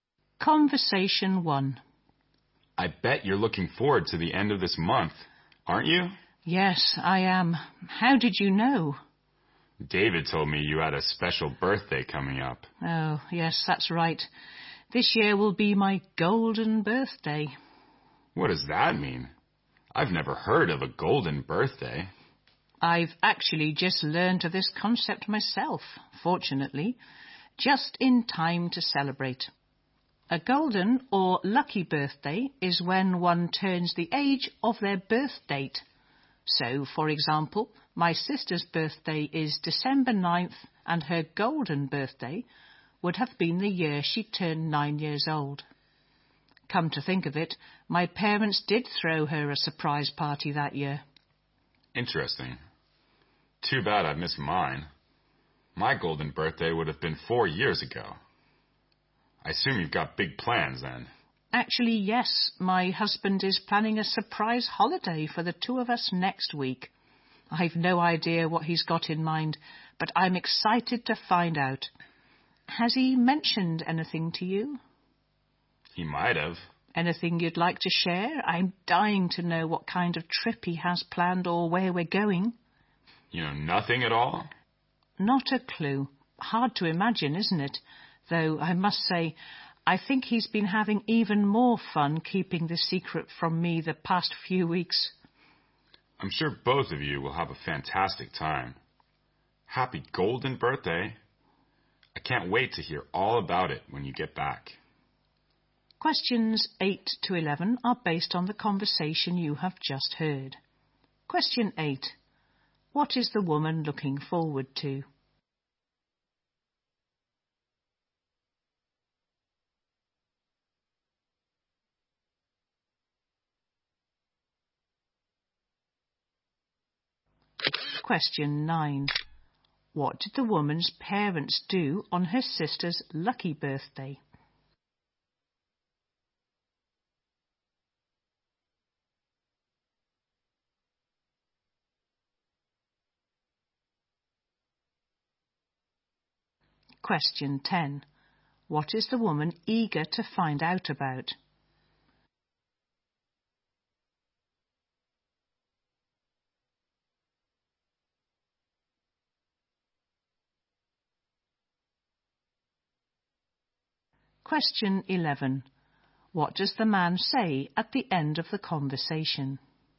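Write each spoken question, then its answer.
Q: What is the woman looking forward to?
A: Her golden birthday

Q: What did the woman's parents do on her sister's lucky birthday?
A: They threw her a surprise party

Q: What is the woman eager to find out about?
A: The surprise trip her husband has planned

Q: What does the man say at the end of the conversation?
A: He wishes her a happy golden birthday and wants to hear about the trip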